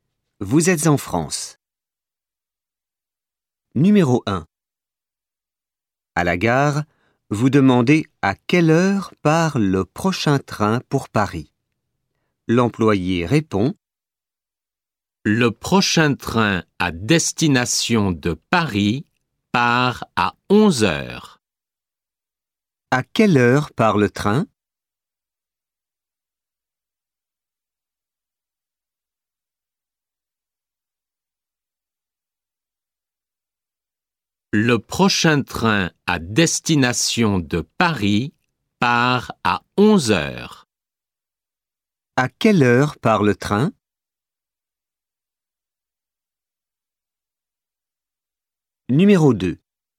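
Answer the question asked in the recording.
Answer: À 11 heures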